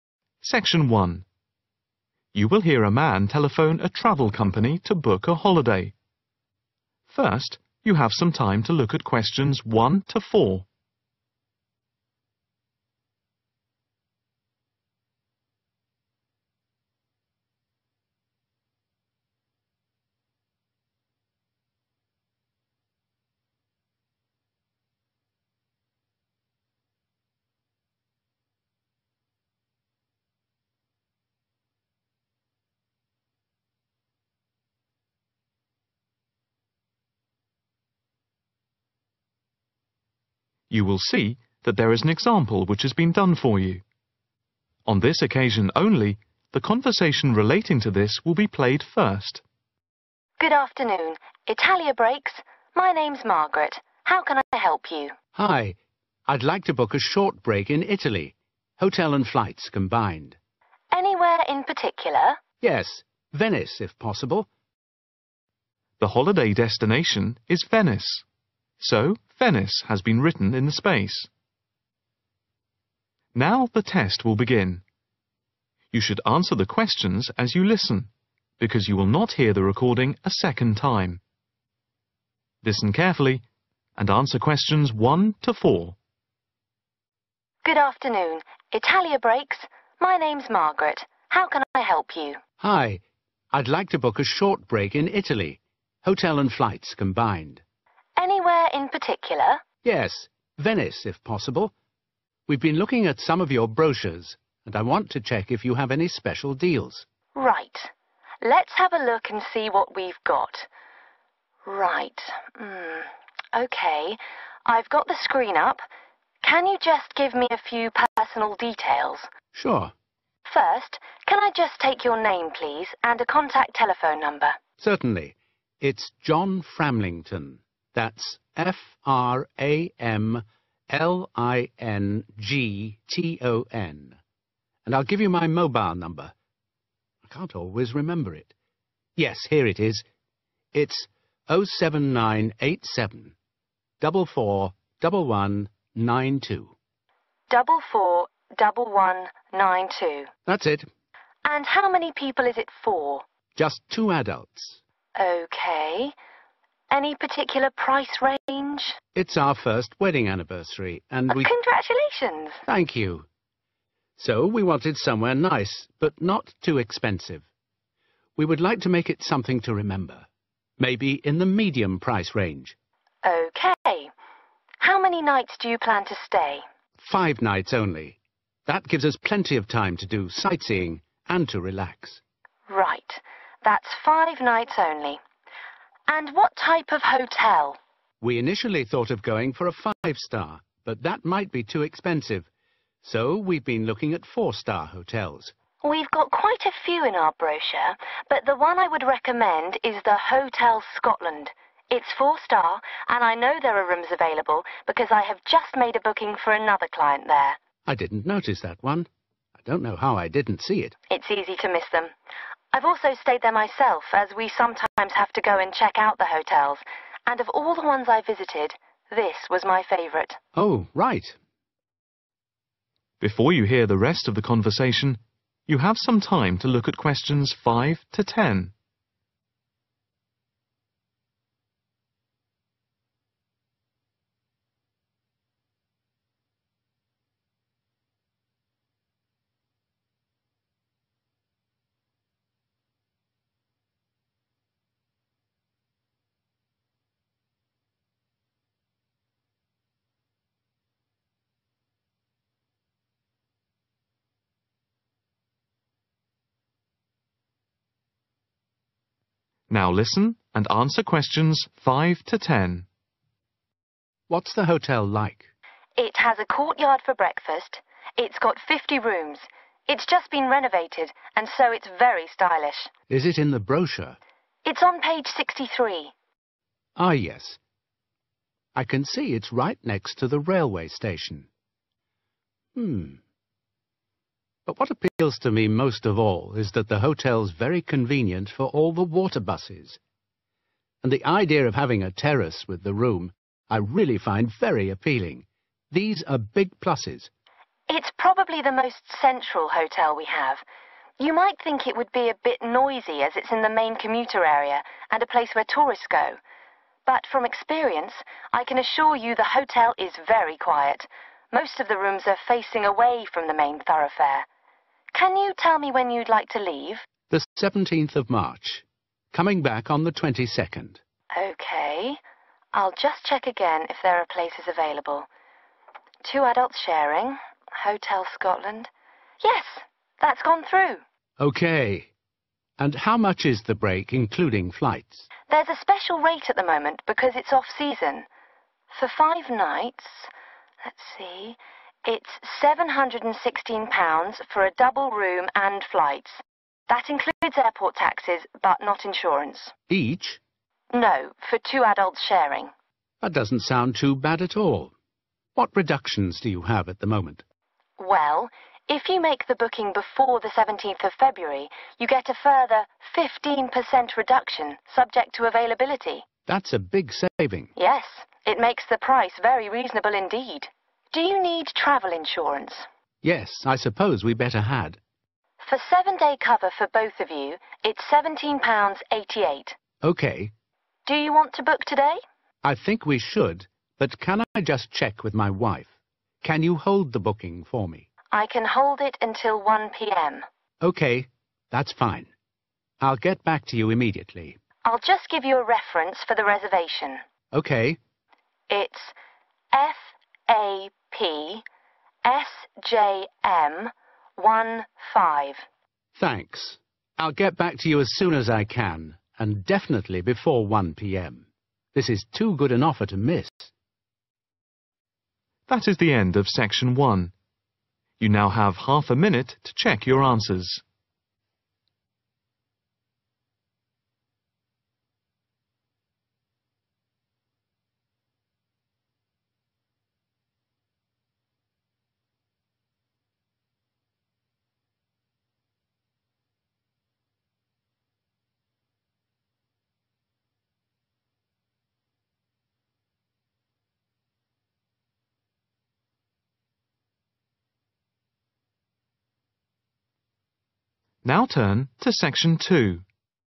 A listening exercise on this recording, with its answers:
Complete the notes below. Write NO MORE THAN ONE WORD AND/OR A NUMBER for each answer.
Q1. Name: John (Q:1)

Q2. Mobile number: 07987 (Q:2)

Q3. Holiday length: (Q:3)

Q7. The departure date is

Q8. The holiday excluding insurance costs £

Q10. The booking reference is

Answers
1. framlington
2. 44 11 92
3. 5 nights
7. 17th March
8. 716
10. fapsjm15